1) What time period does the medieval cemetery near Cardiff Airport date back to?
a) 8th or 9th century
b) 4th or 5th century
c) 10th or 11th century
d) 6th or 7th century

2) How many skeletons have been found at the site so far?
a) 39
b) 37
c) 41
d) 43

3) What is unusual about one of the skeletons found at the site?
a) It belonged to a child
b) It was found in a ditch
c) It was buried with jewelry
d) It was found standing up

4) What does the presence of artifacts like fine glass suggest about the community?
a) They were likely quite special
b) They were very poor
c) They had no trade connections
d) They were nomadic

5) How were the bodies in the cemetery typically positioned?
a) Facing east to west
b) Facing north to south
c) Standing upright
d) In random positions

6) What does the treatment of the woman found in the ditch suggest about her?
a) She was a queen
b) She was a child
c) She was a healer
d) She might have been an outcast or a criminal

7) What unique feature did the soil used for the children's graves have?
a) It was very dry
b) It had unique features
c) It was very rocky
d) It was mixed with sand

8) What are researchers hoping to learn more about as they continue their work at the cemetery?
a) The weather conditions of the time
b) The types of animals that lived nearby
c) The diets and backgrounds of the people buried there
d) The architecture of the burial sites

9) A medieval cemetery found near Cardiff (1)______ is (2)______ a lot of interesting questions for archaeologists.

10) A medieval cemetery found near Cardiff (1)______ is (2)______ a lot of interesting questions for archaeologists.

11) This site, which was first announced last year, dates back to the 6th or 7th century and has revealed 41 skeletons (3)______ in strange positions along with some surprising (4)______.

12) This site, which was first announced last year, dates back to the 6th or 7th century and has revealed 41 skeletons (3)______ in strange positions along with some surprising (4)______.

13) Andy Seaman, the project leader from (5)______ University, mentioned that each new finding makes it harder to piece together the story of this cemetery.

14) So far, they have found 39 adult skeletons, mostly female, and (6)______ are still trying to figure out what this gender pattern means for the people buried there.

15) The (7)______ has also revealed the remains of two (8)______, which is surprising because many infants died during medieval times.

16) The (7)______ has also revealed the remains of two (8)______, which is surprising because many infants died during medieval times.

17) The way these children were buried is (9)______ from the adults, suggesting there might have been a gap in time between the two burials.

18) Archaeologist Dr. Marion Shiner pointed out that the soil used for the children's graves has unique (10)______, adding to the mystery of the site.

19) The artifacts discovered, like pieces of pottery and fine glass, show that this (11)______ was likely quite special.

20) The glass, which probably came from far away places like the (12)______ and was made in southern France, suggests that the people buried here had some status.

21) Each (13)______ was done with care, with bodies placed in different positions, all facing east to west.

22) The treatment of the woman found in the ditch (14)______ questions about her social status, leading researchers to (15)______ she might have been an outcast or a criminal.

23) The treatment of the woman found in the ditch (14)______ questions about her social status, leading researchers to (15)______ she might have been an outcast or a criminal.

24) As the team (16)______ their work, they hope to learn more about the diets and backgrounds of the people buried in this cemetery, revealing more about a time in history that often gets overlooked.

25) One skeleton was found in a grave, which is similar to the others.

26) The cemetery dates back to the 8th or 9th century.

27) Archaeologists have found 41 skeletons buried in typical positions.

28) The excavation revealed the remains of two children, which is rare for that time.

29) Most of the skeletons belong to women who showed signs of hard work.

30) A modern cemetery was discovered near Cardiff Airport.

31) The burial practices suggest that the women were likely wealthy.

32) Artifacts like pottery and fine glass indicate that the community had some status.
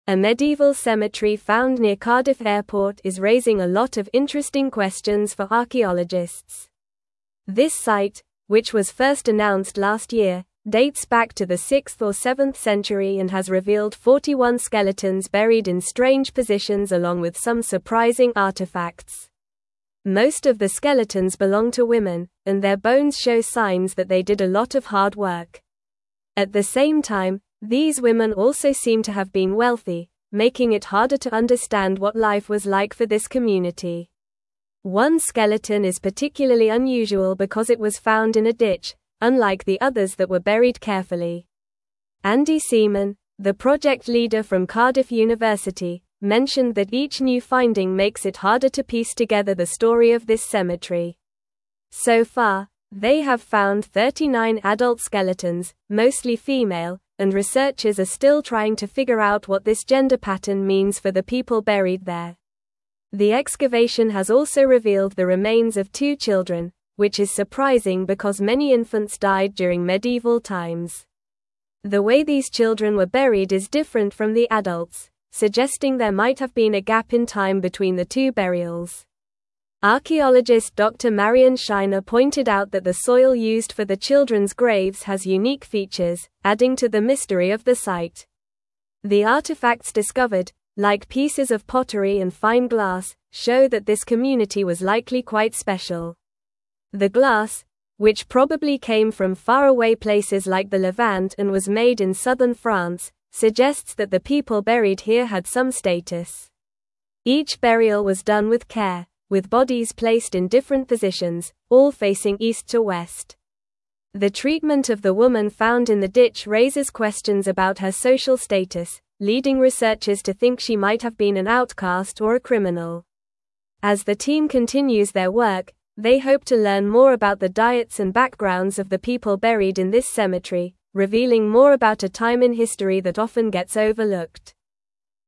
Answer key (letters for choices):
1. d
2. c
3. b
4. a
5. a
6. d
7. b
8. c
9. Airport
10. raising
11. buried
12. artifacts
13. Cardiff
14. researchers
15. excavation
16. children
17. different
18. features
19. community
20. Levant
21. burial
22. raises
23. think
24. continues
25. False
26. False
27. False
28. True
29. True
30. False
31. True
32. True

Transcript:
A medieval cemetery found near Cardiff Airport is raising a lot of interesting questions for archaeologists. This site, which was first announced last year, dates back to the 6th or 7th century and has revealed 41 skeletons buried in strange positions along with some surprising artifacts. Most of the skeletons belong to women, and their bones show signs that they did a lot of hard work. At the same time, these women also seem to have been wealthy, making it harder to understand what life was like for this community.
One skeleton is particularly unusual because it was found in a ditch, unlike the others that were buried carefully. Andy Seaman, the project leader from Cardiff University, mentioned that each new finding makes it harder to piece together the story of this cemetery. So far, they have found 39 adult skeletons, mostly female, and researchers are still trying to figure out what this gender pattern means for the people buried there.
The excavation has also revealed the remains of two children, which is surprising because many infants died during medieval times. The way these children were buried is different from the adults, suggesting there might have been a gap in time between the two burials. Archaeologist Dr. Marion Shiner pointed out that the soil used for the children's graves has unique features, adding to the mystery of the site.
The artifacts discovered, like pieces of pottery and fine glass, show that this community was likely quite special. The glass, which probably came from far away places like the Levant and was made in southern France, suggests that the people buried here had some status. Each burial was done with care, with bodies placed in different positions, all facing east to west. The treatment of the woman found in the ditch raises questions about her social status, leading researchers to think she might have been an outcast or a criminal. As the team continues their work, they hope to learn more about the diets and backgrounds of the people buried in this cemetery, revealing more about a time in history that often gets overlooked.

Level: Level 3